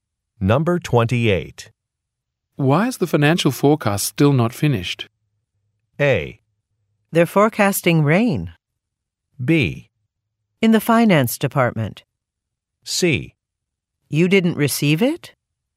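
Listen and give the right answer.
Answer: C: You didn't receive it?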